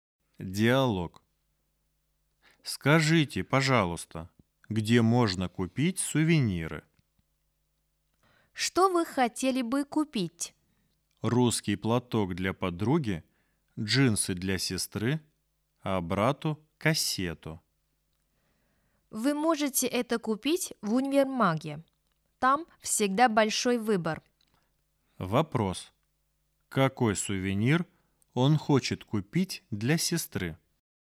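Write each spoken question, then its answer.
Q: Какой сувенир он хочет купить для сестры?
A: джинсы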